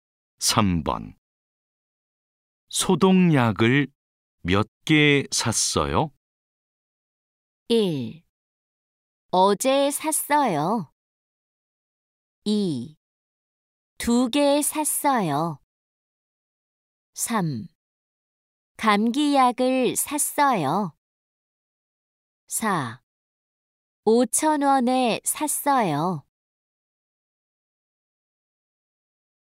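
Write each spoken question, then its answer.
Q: 소독약을 몇 개 샀어요?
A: 2: 두 개 샀어요.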